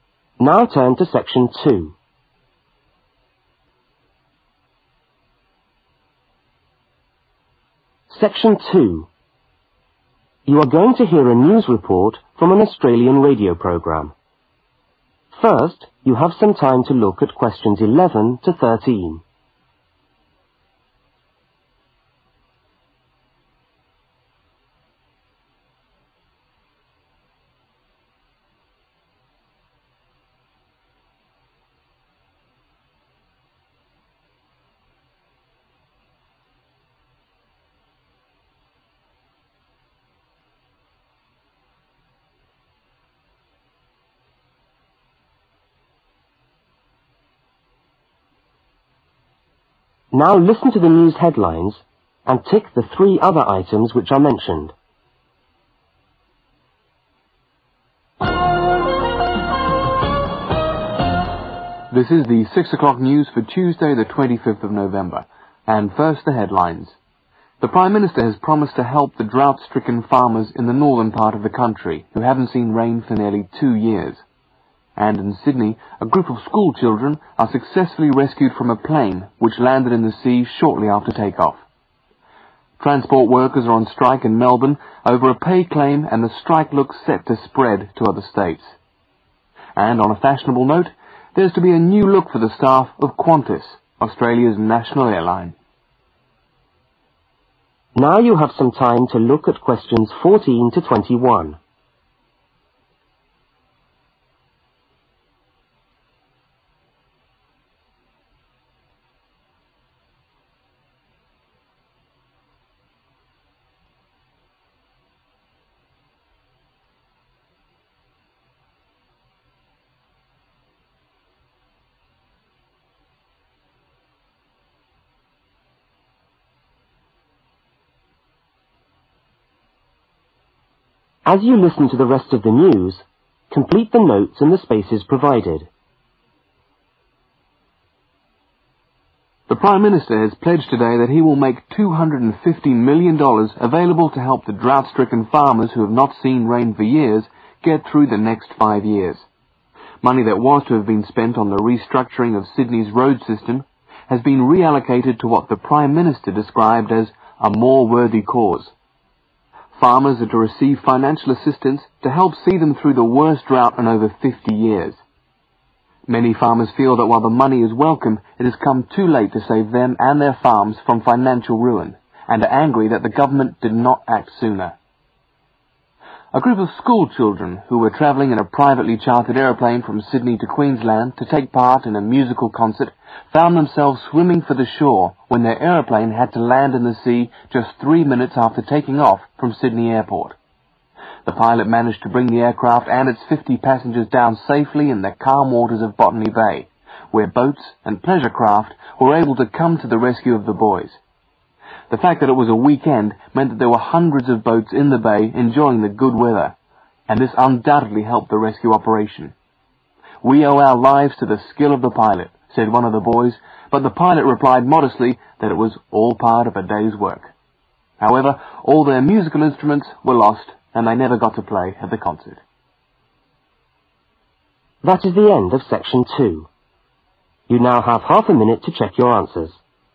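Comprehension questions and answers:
Circle the THREE other items which are mentioned in the news headlines.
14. The Government plans to give (14) $ to assist the farmers.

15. This money was to be spent on improving Sydney's (15) but has now been re-allocated.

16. Farmers say that the money will not help them because it is (16)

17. An aeroplane which was carrying a group of (17) was forced to land just (18) minutes after take-off.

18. An aeroplane which was carrying a group of (17) was forced to land just (18) minutes after take-off.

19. The passengers were rescued by (19)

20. The passengers thanked the (20) for saving their lives but unfortunately they lost their (21)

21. The passengers thanked the (20) for saving their lives but unfortunately they lost their (21)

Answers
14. 250 million
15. road system
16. too late
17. school children
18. 3
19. boats and pleasure craft
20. pilot
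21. musical instruments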